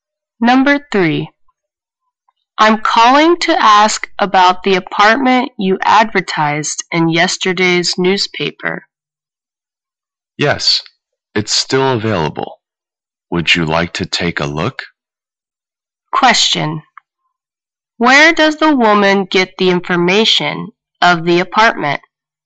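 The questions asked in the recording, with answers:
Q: Where does the woman get the information of the apartment?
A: From yesterday's newspaper advertisement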